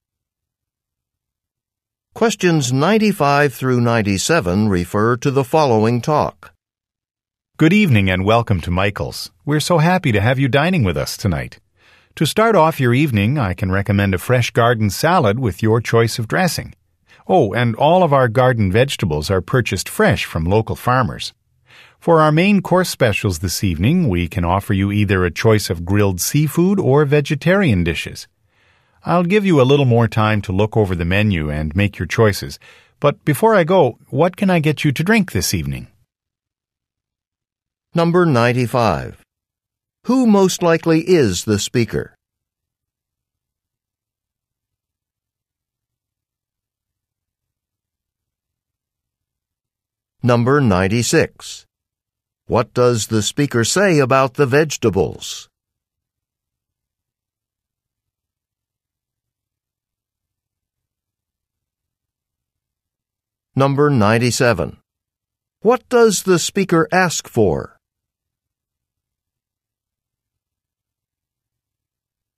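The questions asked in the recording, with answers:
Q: Who most likely is the speaker?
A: A waiter

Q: What does the speaker say about the vegetables?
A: They are bought fresh from local farmers

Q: What does the speaker ask for?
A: Drink orders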